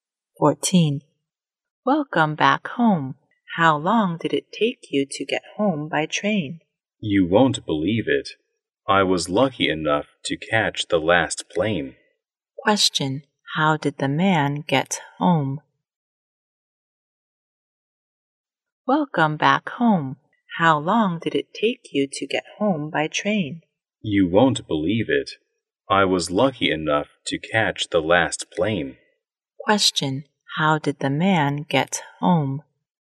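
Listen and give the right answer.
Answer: By plane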